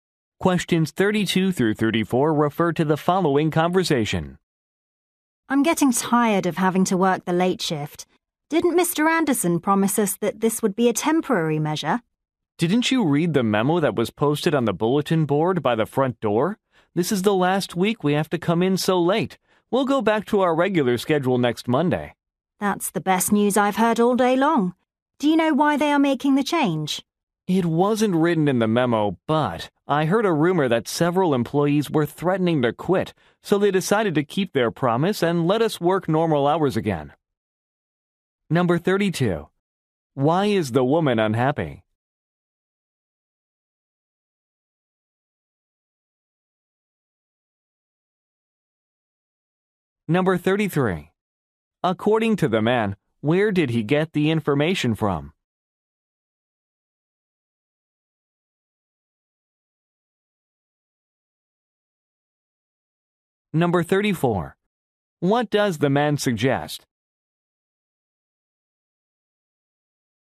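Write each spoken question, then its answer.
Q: Why is the woman unhappy?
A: She is tired of working the late shift

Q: According to the man, where did he get the information from?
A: A memo posted on the bulletin board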